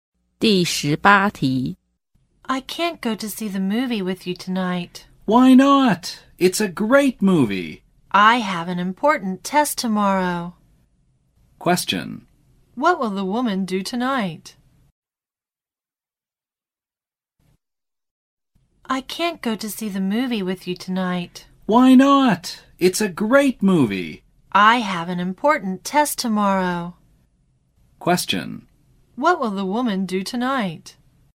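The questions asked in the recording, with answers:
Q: What will the woman do tonight?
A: Study for her important test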